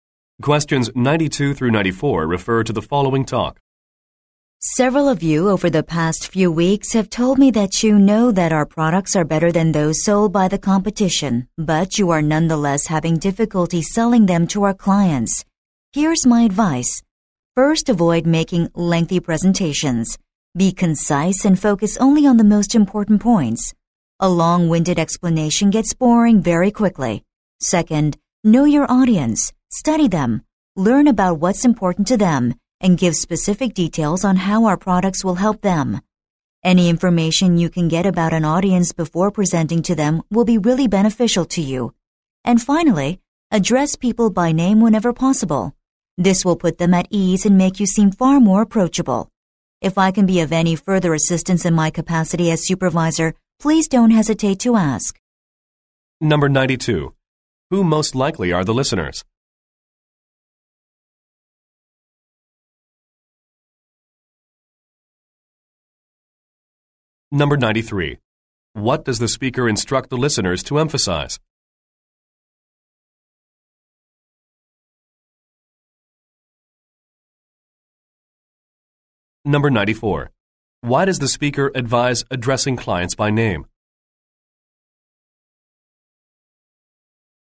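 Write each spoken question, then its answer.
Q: Who most likely are the listeners?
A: Salespeople

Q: Why does the speaker advise addressing clients by name?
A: To put them at ease and seem more approachable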